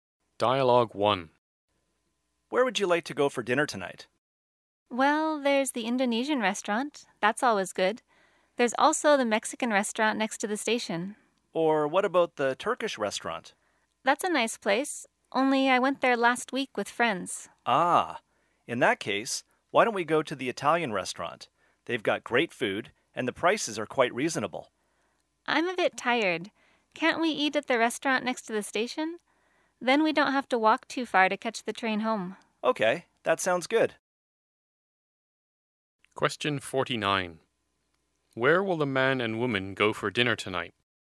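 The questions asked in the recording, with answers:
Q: Where will the man and woman go for dinner tonight?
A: The Mexican restaurant next to the station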